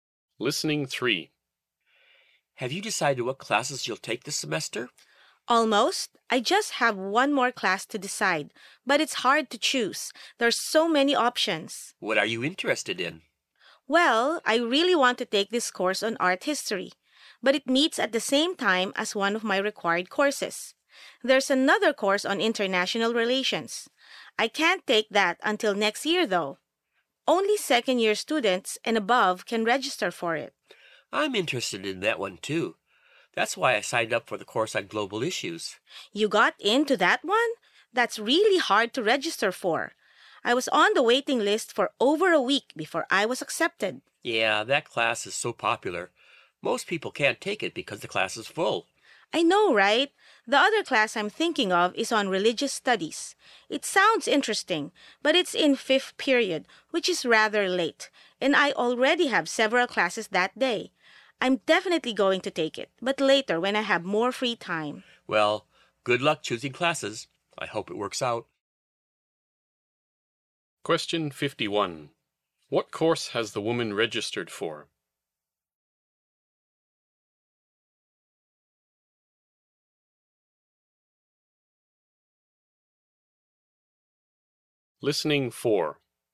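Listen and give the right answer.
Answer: The course on global issues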